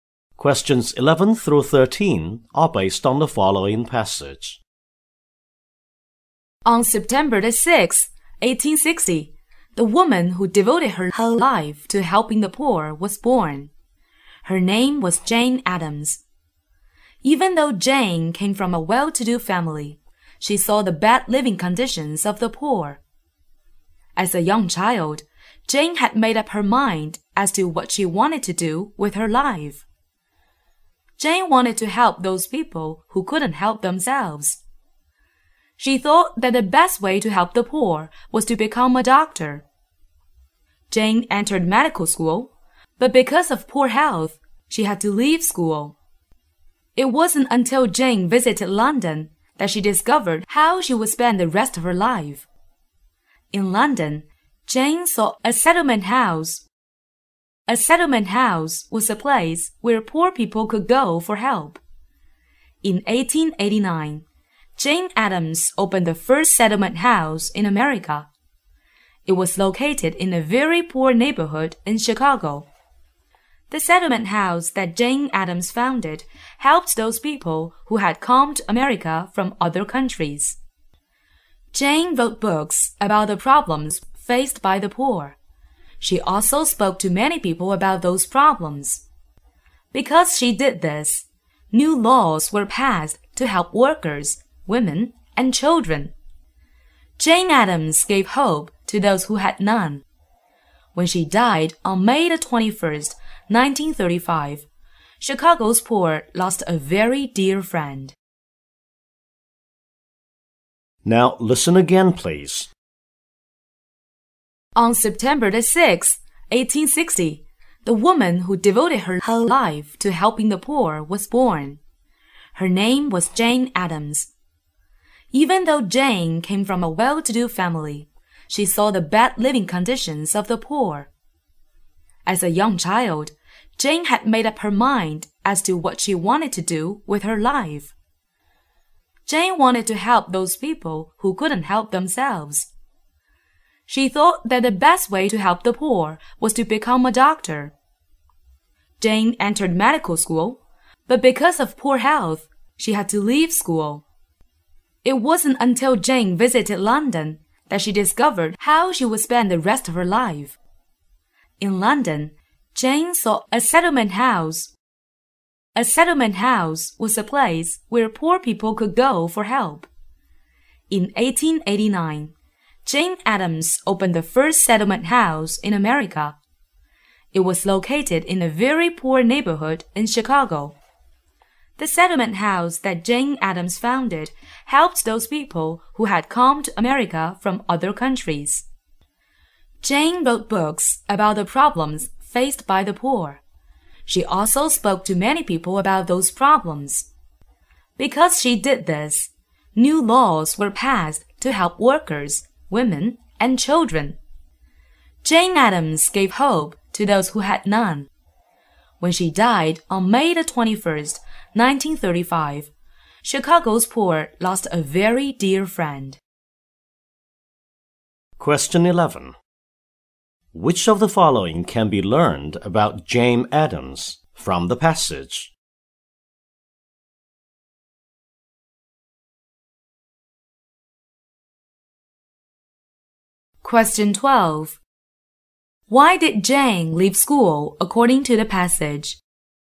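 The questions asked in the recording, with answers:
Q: Why did Jane leave school according to the passage?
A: Because of poor health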